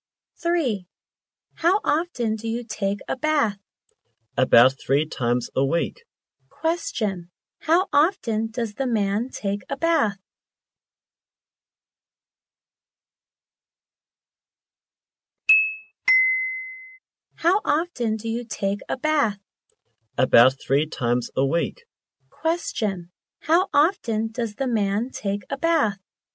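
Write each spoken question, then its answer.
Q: How often does the man take a bath?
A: About 3 times a week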